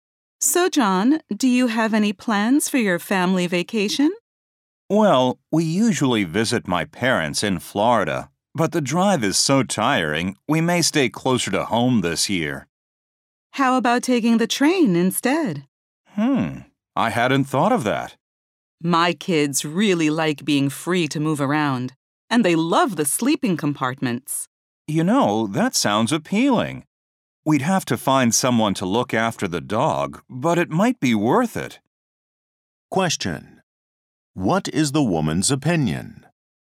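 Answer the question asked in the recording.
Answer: The man's family should take the train instead of driving.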